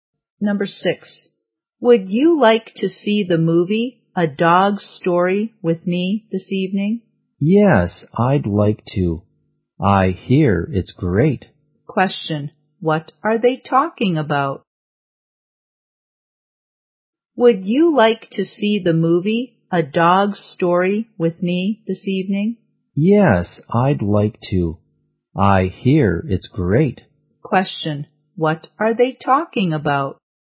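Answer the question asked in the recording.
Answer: A movie, A Dog's Story.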